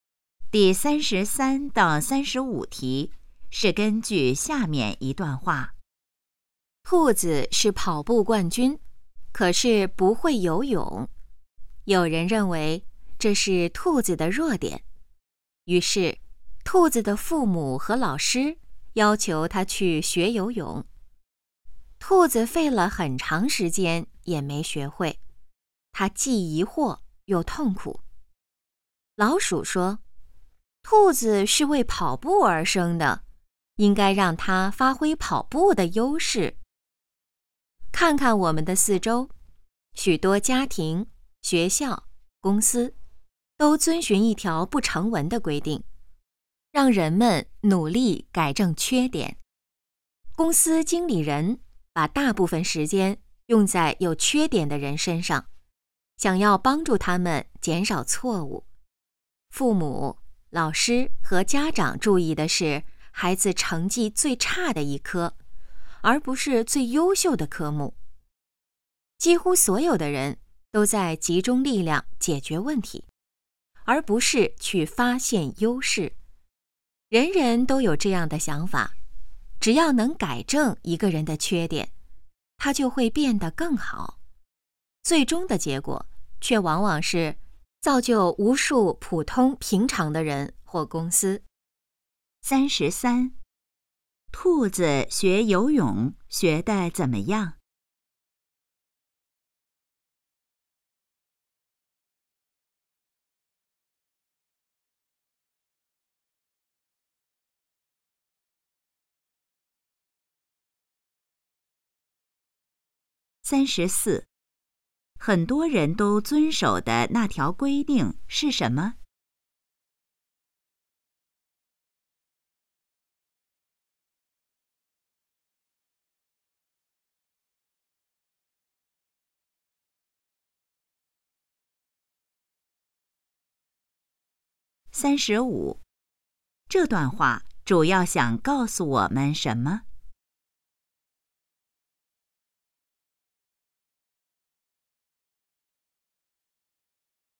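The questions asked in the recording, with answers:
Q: 兔子学游泳学得怎么样?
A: 很长时间也没学会

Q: 很多人都遵守的那条规定是什么?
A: 努力改正缺点

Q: 这段话主要想告诉我们什么?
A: 要发挥优势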